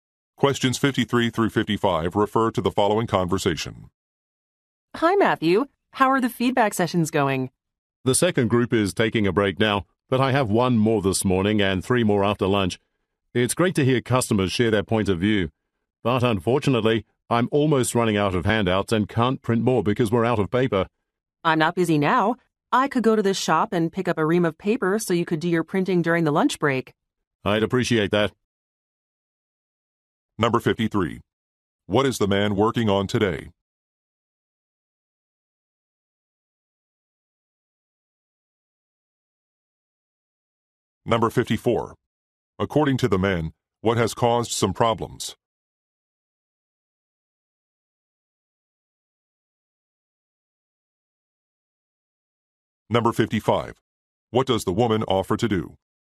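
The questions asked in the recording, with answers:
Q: What is the man working on today?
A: Customer feedback sessions

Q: According to the man, what has caused some problems?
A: They are out of paper for printing handouts

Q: What does the woman offer to do?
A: Go to the shop and buy paper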